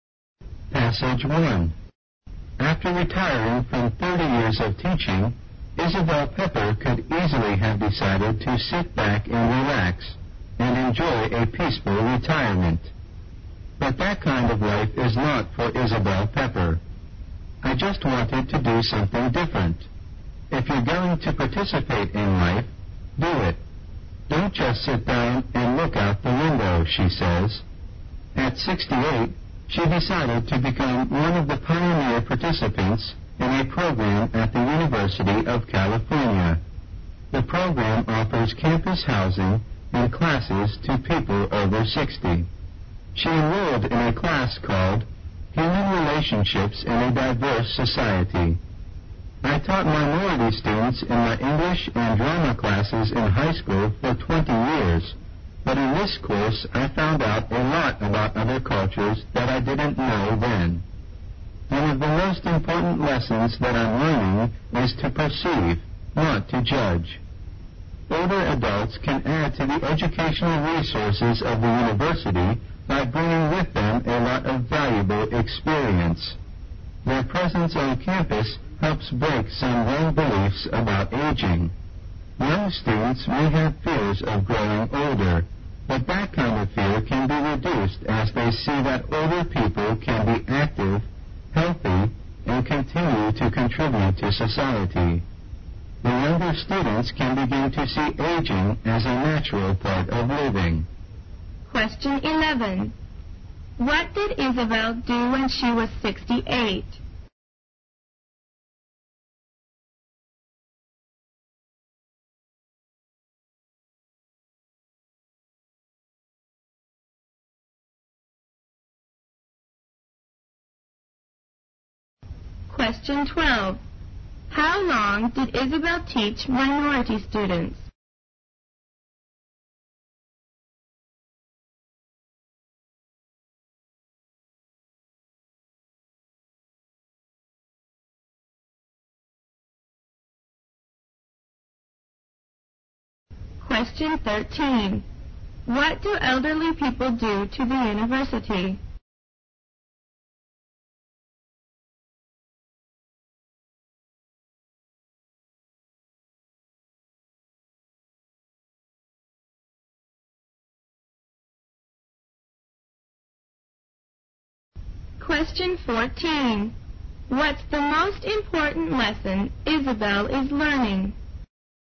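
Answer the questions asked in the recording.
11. She joined a University of California program for people over 60 and took classes.
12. 20 years.
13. They add to its educational resources by bringing valuable experience.
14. To perceive, not to judge.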